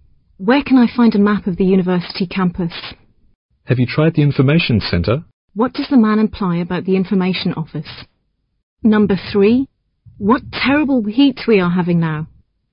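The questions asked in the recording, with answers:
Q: What does the man imply about the information office?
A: A campus map may be found there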